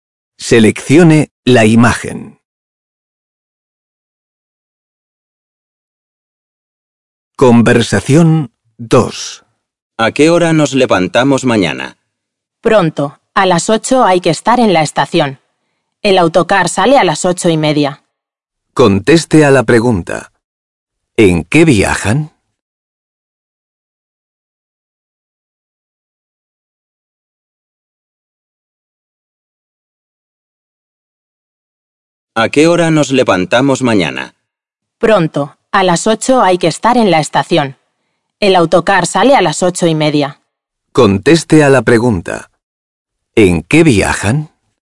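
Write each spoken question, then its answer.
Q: ¿En qué viajan?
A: En autocar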